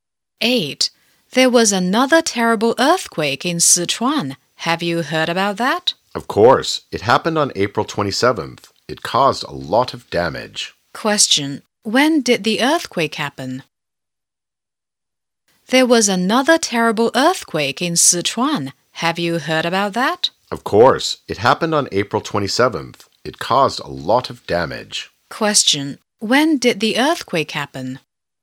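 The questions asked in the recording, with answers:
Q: When did the earthquake happen?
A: On April 27th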